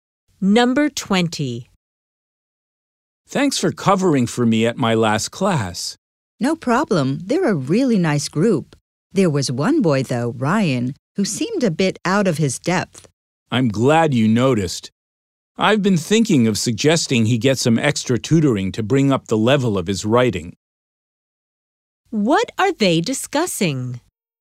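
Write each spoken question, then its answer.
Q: What are they discussing?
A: A student, Ryan, who is struggling with his writing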